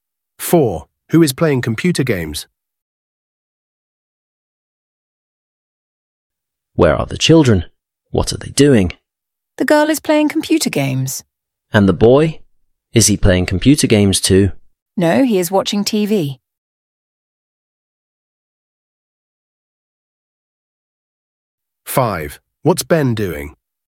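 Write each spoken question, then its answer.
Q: Who is playing computer games?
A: The girl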